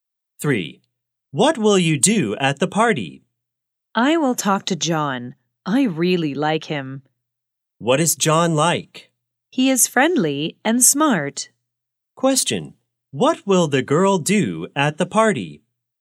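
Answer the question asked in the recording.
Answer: Talk to John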